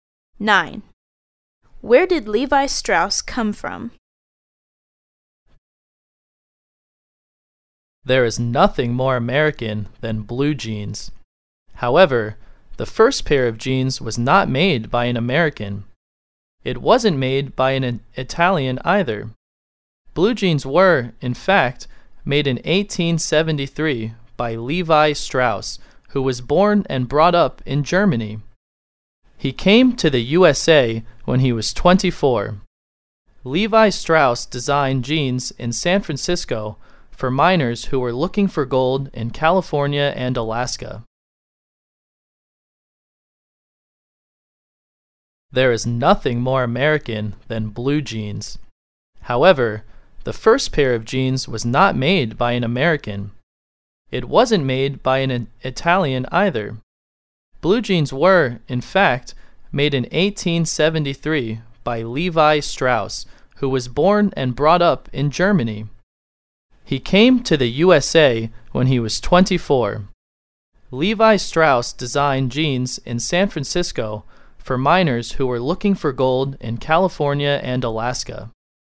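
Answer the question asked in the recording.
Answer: Germany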